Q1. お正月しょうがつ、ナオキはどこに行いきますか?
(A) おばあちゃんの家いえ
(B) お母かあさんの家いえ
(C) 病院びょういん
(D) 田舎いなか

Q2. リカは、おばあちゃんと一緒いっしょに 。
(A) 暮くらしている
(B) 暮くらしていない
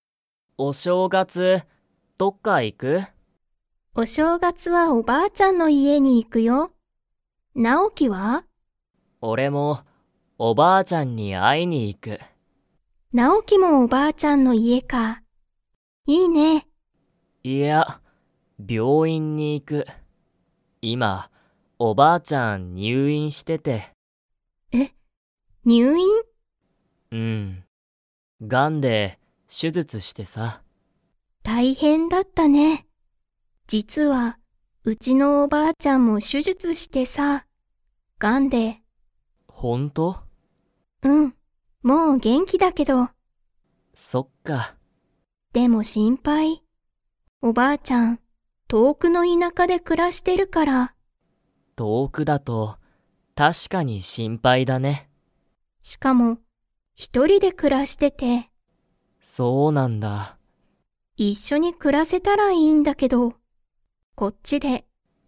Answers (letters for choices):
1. C
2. B

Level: Level 4